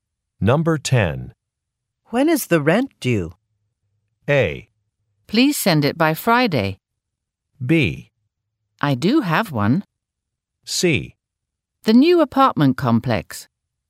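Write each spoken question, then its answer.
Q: When is the rent due?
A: A: Please send it by Friday.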